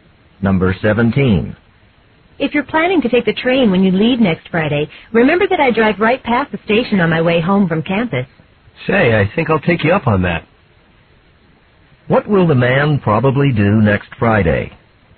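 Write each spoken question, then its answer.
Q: What will the man probably do next Friday?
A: Get a ride to the train station with the woman.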